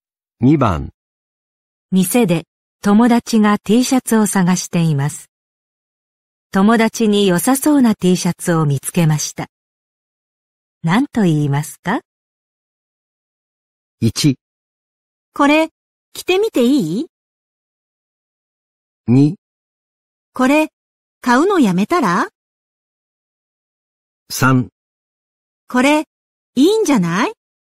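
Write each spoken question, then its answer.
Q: 何と言いますか?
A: 3: これ、いいんじゃない?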